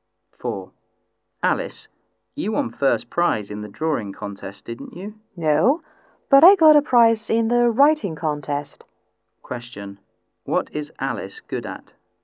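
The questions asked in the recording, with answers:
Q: what is Alice good at?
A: Writing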